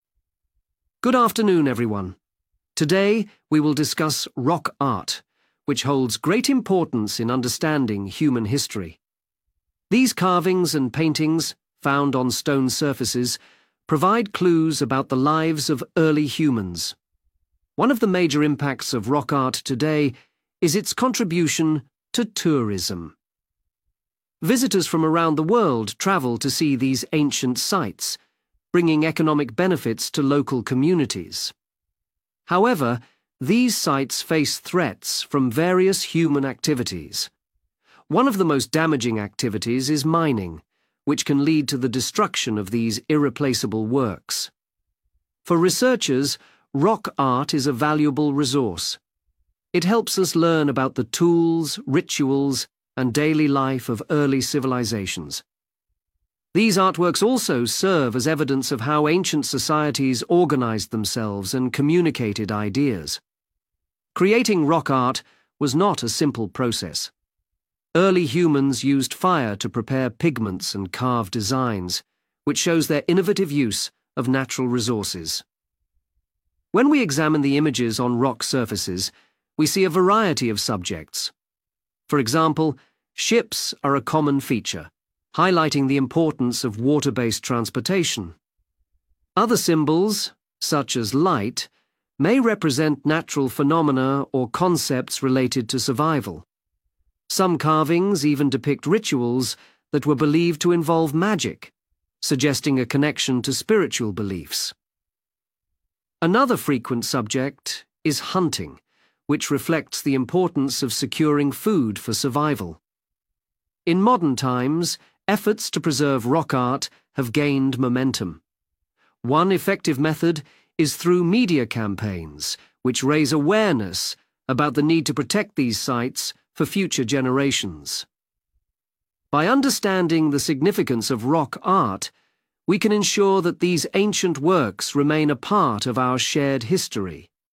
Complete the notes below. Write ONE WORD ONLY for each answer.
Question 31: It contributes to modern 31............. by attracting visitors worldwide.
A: Tourism

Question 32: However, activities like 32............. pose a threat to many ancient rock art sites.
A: Mining

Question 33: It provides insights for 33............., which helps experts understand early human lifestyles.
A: Research

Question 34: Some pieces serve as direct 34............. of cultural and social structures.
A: Evidence

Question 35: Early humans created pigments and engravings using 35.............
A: Fire

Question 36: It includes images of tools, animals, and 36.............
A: Ship

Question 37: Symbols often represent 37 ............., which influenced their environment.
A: Light

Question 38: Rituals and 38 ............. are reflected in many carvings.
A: Magic

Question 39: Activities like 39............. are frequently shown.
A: Hunting

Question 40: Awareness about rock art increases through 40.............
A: Media